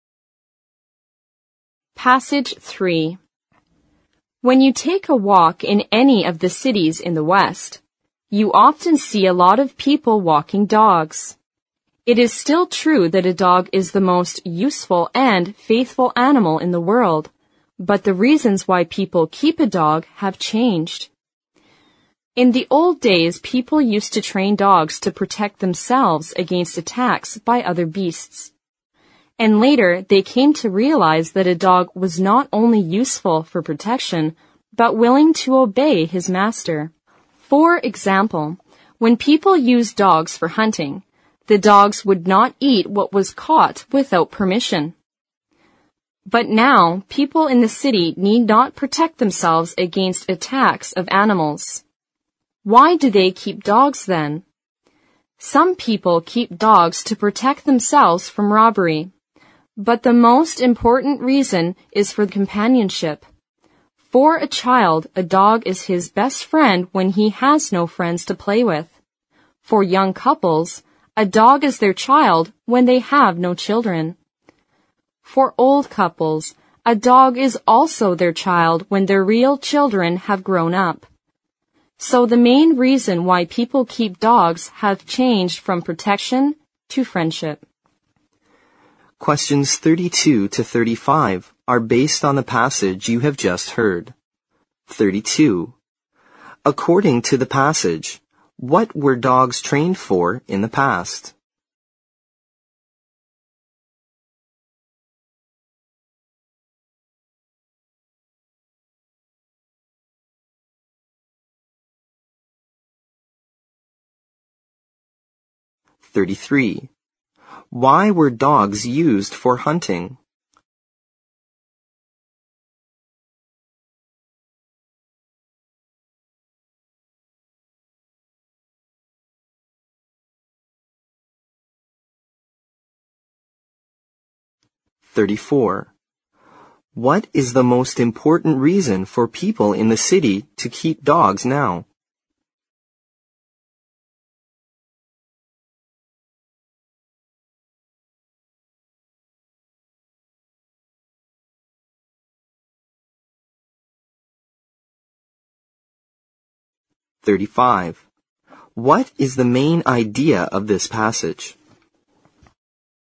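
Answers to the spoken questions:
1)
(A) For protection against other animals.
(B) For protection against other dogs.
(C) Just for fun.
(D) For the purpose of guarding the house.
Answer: (A) For protection against other animals.
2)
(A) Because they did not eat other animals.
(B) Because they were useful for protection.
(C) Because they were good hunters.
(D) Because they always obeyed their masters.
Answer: (D) Because they always obeyed their masters.
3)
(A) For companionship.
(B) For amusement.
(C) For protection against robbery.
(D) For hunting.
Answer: (A) For companionship.
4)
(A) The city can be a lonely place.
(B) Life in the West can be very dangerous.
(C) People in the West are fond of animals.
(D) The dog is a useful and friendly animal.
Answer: (D) The dog is a useful and friendly animal.

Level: 新编四级听力练习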